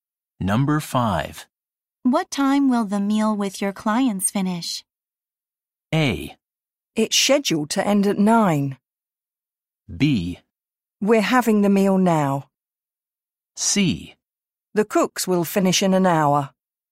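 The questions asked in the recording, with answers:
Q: What time will the meal with your clients finish?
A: A: It's scheduled to end at 9.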